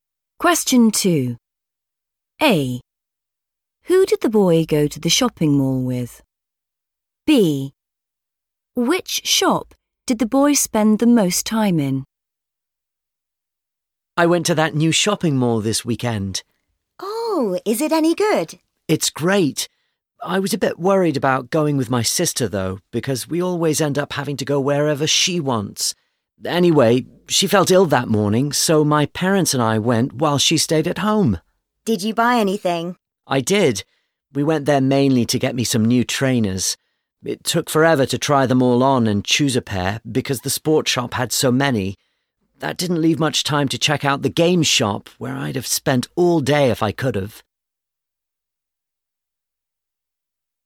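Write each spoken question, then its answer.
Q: Who did the boy go to the shopping mall with?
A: his parents

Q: Which shop did the boy spend the most time in?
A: the sport shop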